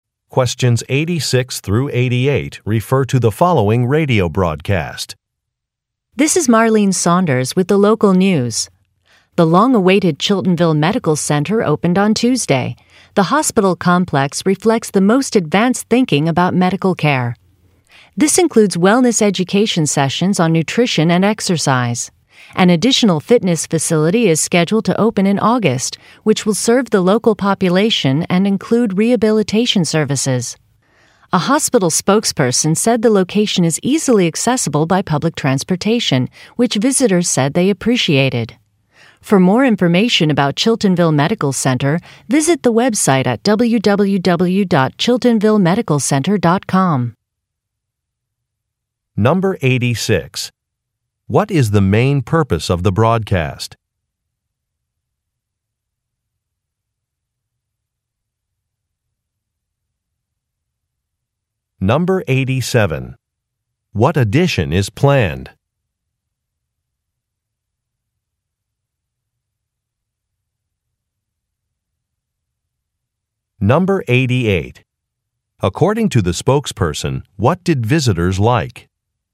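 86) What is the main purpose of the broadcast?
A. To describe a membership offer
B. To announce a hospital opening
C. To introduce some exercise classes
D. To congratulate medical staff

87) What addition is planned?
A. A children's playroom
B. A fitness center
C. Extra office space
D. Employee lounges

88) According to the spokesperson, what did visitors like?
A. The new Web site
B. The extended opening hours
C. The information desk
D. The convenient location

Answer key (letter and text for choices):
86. B. To announce a hospital opening
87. B. A fitness center
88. D. The convenient location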